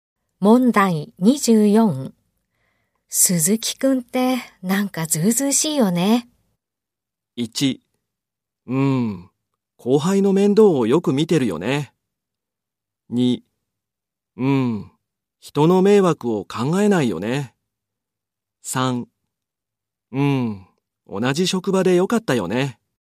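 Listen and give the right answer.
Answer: 2: うん、人の迷惑を考えないよね。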